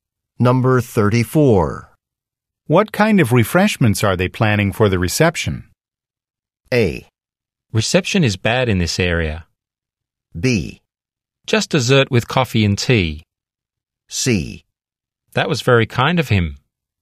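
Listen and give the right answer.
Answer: B: Just dessert with coffee and tea.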